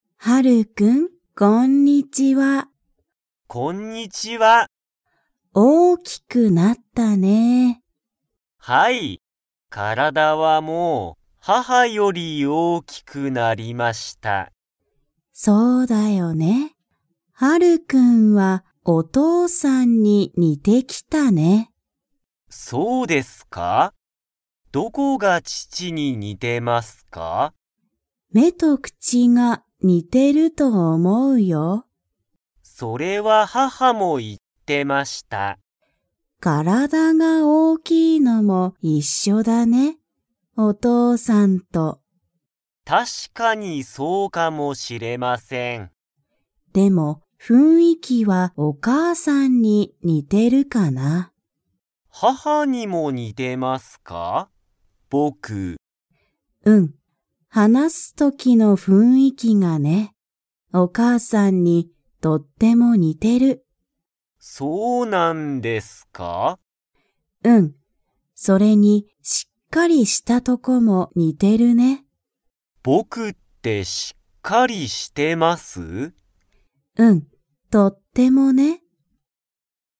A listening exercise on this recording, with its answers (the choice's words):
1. ハルくんの体からだは、誰だれより大おおきくなりましたか?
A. 叔母おば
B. 母はは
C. 父ちち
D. 妹いもうと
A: 母はは

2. ハルくんは、しっかり 。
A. している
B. していない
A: している

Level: Level 3